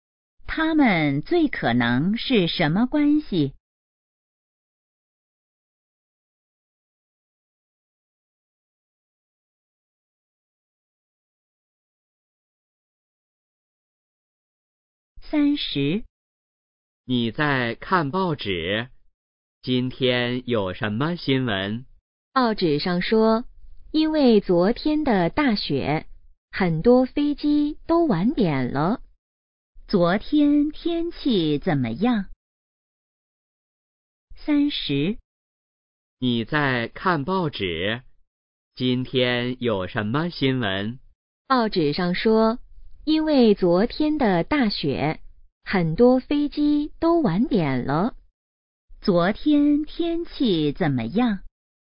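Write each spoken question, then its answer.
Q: 昨天天气怎么样?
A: 下大雪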